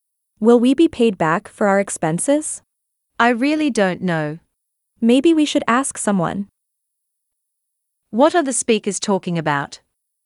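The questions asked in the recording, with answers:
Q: What are the speakers talking about?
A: Being paid back for their expenses.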